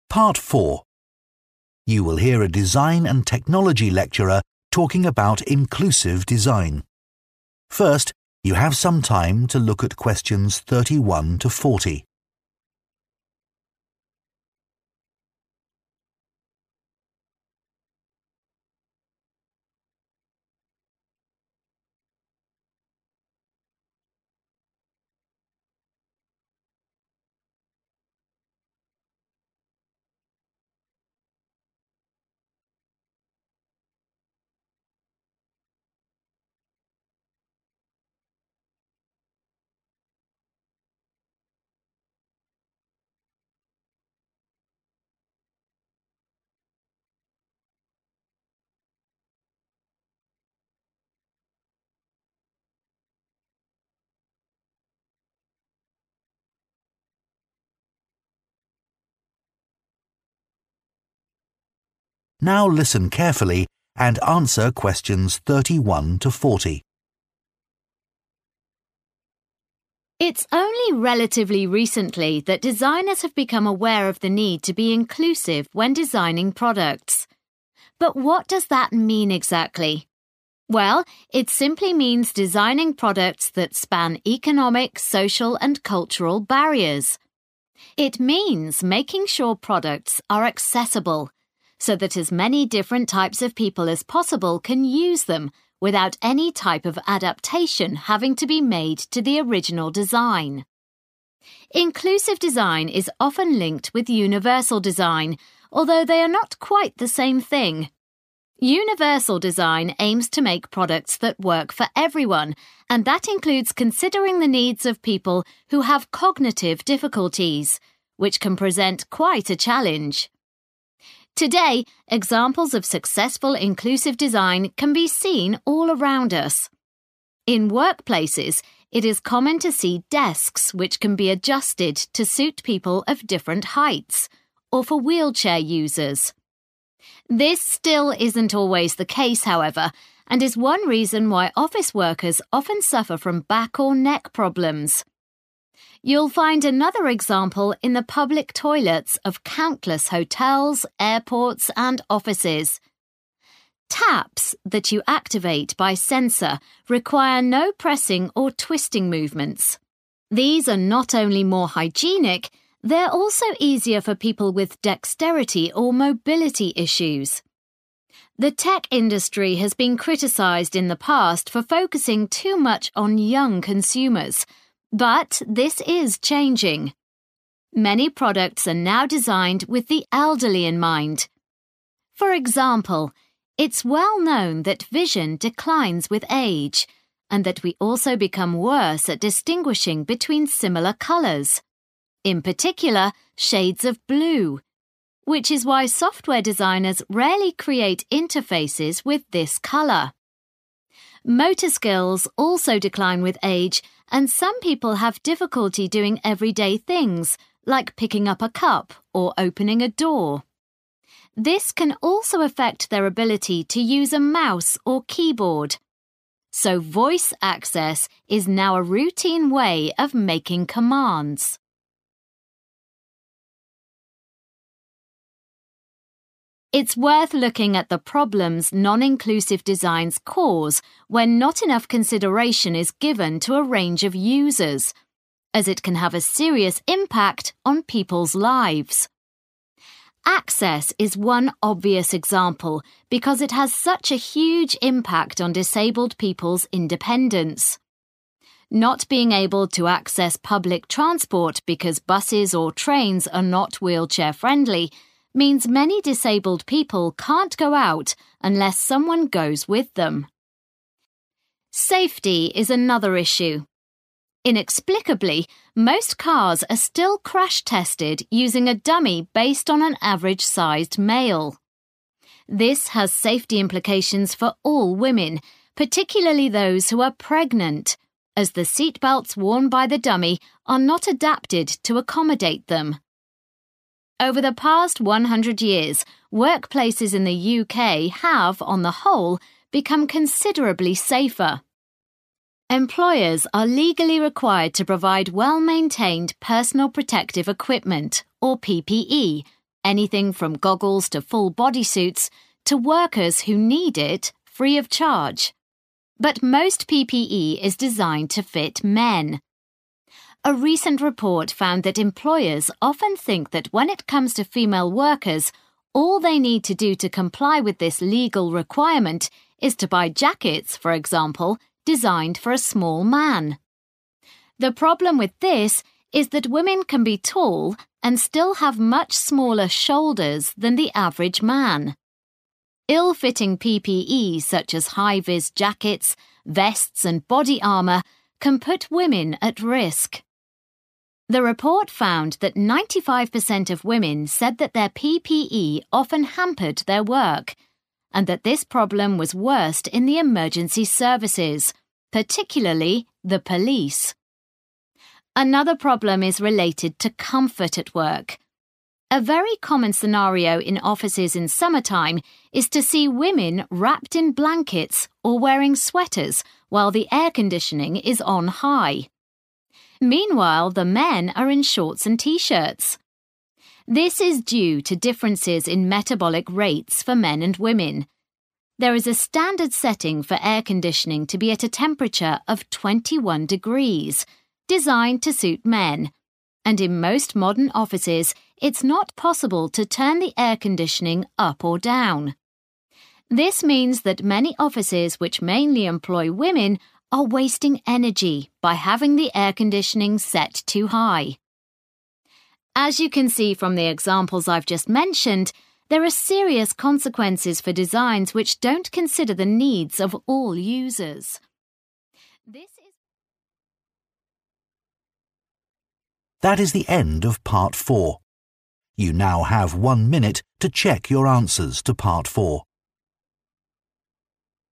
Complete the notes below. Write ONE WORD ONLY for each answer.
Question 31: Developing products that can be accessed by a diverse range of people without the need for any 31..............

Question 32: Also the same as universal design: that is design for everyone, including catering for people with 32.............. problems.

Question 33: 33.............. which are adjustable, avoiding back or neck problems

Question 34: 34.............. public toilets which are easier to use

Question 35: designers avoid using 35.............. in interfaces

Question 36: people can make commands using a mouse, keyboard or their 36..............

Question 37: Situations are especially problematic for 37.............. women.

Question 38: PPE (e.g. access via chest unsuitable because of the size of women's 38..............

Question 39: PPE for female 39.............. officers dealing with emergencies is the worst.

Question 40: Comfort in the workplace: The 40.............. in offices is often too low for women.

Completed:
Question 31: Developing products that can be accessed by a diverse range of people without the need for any adaptation
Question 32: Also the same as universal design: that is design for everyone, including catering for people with cognitive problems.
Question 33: desks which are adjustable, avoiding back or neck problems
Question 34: taps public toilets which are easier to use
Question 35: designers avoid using blue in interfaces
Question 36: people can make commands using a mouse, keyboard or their voice
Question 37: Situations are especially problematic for pregnant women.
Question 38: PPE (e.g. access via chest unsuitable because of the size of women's shoulders
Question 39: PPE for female police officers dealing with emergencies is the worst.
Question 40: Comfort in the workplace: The temperature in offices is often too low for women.